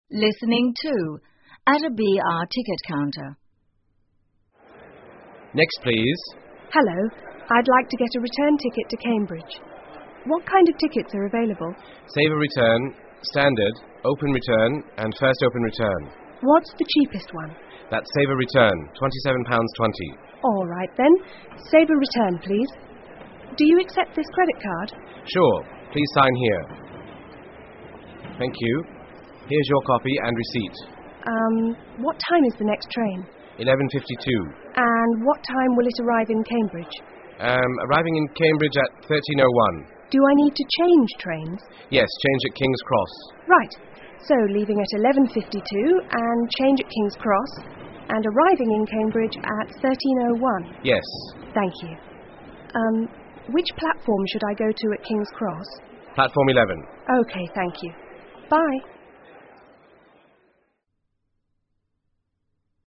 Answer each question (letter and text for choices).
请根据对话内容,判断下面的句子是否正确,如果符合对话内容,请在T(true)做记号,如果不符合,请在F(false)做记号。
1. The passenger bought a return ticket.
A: T

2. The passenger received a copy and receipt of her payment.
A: T

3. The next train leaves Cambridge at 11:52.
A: F

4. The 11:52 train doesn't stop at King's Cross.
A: F

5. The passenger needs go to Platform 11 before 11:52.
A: F

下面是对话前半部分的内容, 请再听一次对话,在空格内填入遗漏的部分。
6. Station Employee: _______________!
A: Next,please

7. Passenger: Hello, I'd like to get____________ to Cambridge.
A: a return ticket

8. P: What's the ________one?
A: cheapest

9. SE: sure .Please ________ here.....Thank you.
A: sign

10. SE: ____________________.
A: 11.52

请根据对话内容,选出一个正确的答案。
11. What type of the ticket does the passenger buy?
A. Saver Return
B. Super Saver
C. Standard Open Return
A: A. Saver Return

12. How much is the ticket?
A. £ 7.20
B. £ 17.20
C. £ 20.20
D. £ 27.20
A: D. £ 27.20

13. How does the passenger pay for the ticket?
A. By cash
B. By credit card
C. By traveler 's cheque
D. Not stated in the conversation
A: B. By credit card

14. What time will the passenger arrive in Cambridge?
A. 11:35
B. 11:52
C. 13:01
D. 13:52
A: C. 13:01

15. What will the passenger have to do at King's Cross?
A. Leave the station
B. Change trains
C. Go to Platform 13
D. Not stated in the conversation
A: B. Change trains

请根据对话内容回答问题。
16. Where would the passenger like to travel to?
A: Cambridge